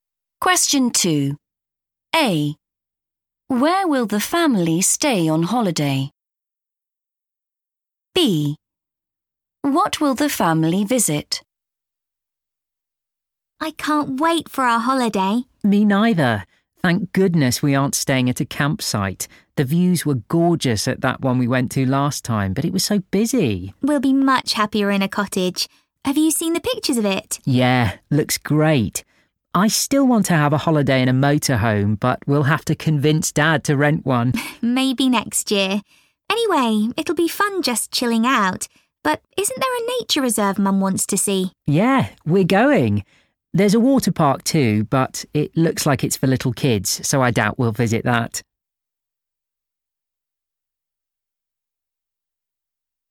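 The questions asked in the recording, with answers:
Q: Where will the family stay on holiday?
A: a cottage

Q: What will the family visit?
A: a nature reserve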